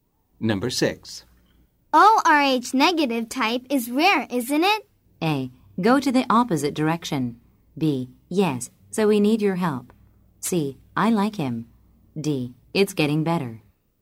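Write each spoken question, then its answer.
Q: ORH negative type is rare, isn't it?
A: B: Yes, so we need your help.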